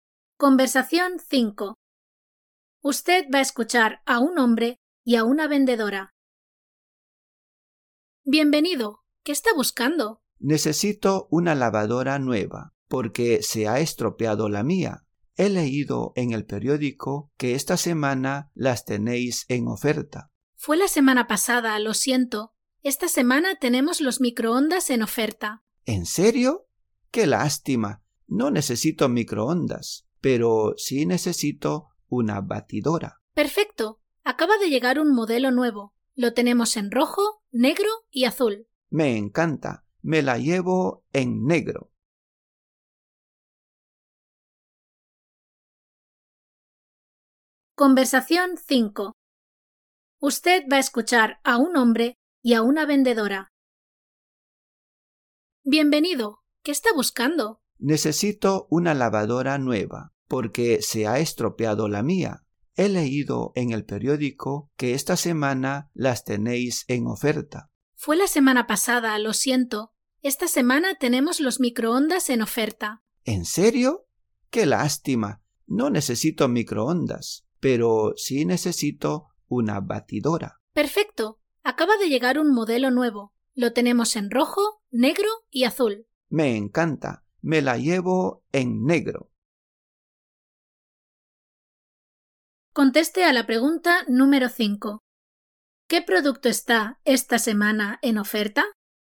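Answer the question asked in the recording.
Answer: Los microondas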